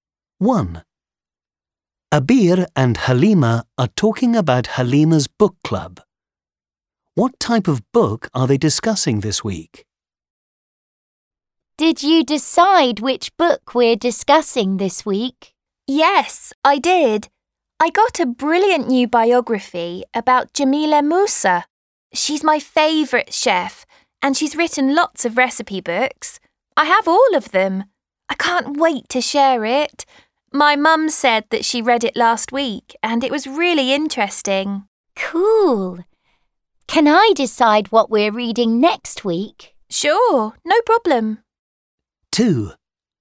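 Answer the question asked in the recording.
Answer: A biography (of the chef Jamila Musa)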